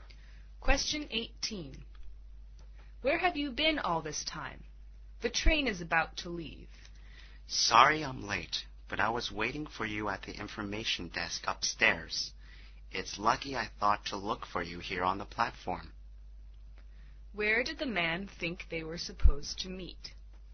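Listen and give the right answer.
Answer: At the information desk upstairs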